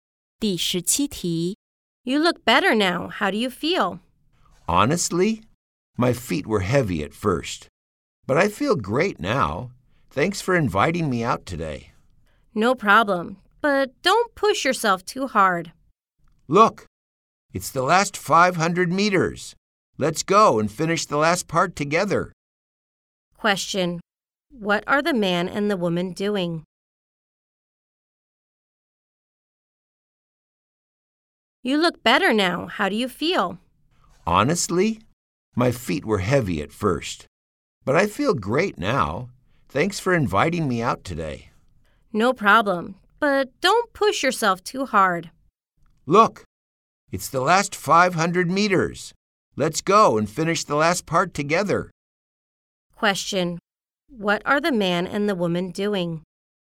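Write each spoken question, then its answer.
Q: Question: What are the man and the woman doing?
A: Running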